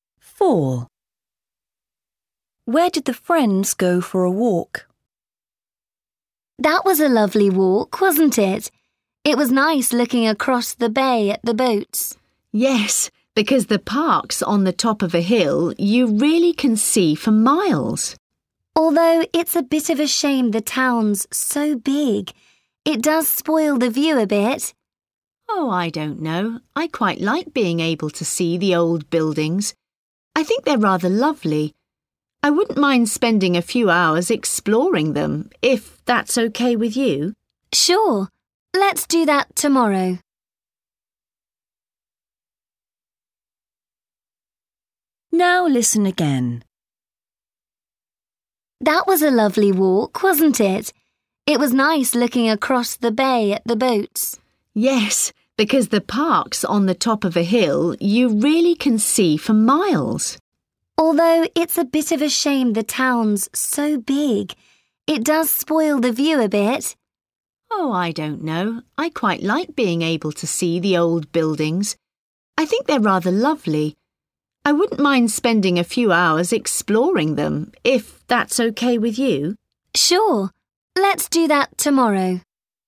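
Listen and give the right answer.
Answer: In the park on a hill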